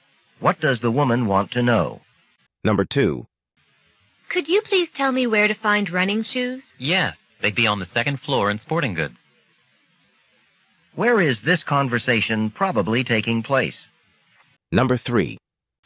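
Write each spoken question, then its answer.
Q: Where is this conversation probably taking place?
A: In a department store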